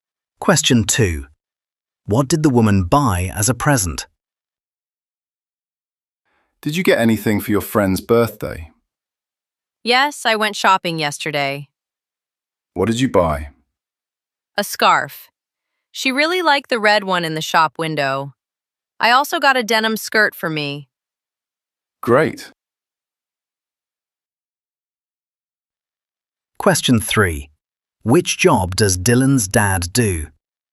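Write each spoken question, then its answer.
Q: What did the woman buy as a present?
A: A scarf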